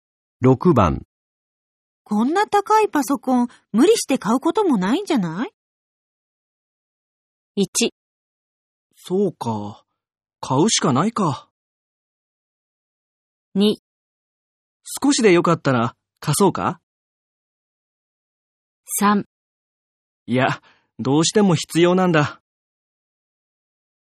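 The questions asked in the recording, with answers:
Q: こんな高いパソコン、無理して買うこともないんじゃない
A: 3: いや、どうしても必要なんだ。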